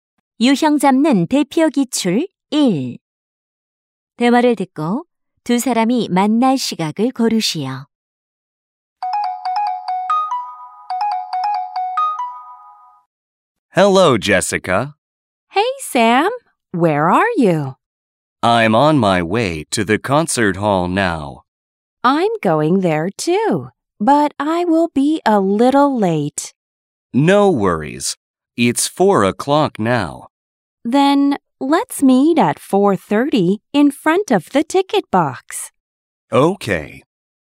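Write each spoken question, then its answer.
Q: 대화를 듣고 두 사람이 만날 시각을 고르시오.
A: 4시 30분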